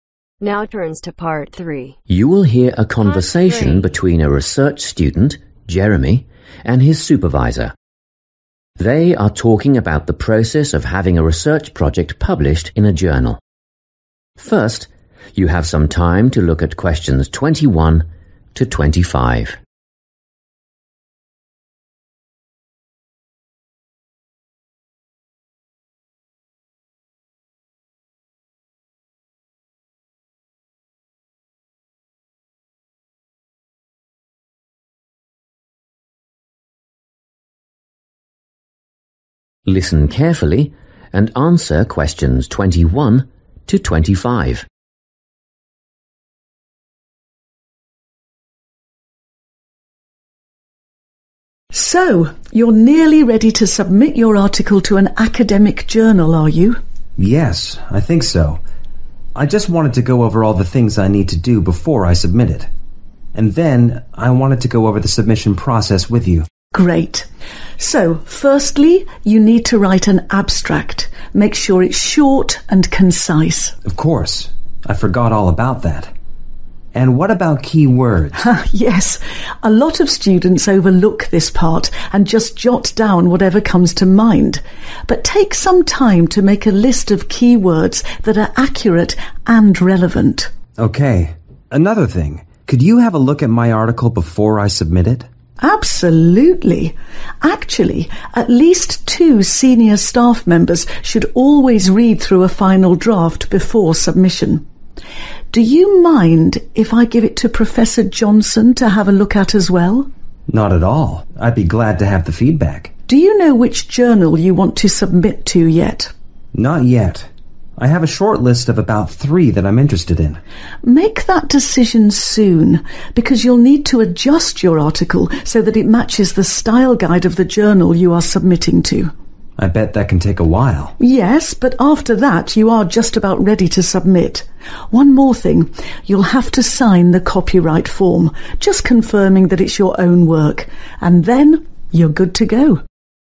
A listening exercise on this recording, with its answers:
Complete the notes below. Write NO MORE THAN TWO WORDS for each answer.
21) Write an (21)............ – keep it brief.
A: abstract

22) List relevant (22)............ .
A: keywords

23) Have two academic advisors read over your (23)............ .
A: final draft

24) Apply the journal's (24)............ to your article.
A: style guide

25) Sign the (25)............ .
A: copyright form